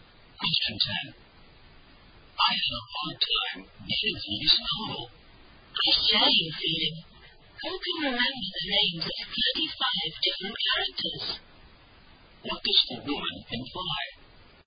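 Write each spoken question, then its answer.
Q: What does the woman imply?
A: She also found the novel hard to get through because it had too many characters.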